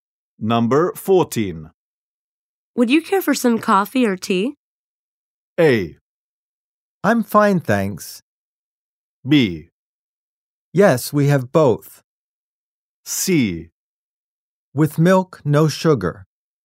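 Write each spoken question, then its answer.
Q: Would you care for some coffee or tea?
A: A: I'm fine, thanks.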